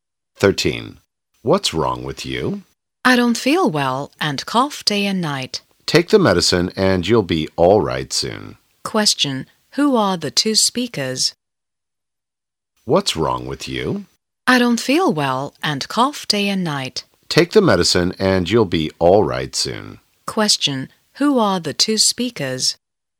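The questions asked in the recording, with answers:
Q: Who are the two speakers?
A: A doctor and a patient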